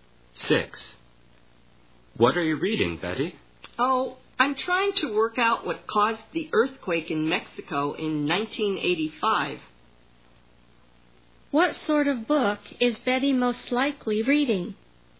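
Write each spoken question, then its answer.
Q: What sort of book is Betty most likely reading?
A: A book about earthquakes (geology/science).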